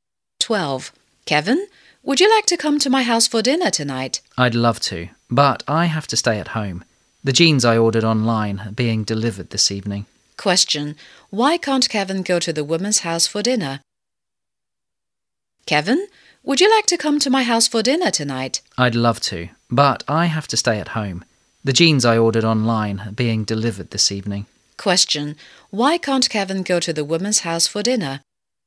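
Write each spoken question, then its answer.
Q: Why can't Kevin go to the woman's house for dinner?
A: He has to stay home to receive the jeans he ordered online.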